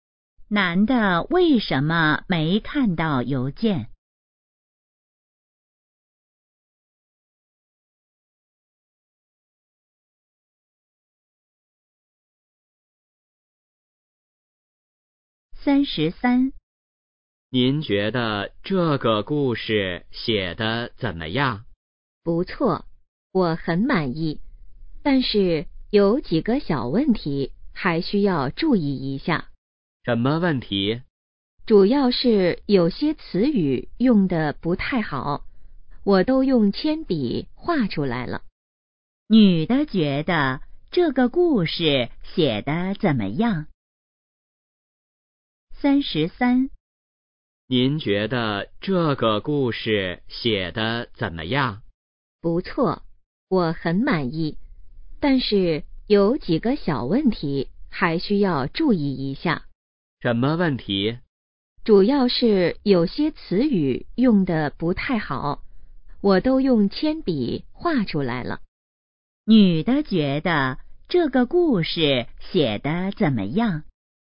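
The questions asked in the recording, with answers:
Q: 女的觉得这个故事写得怎么样?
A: 不错,很满意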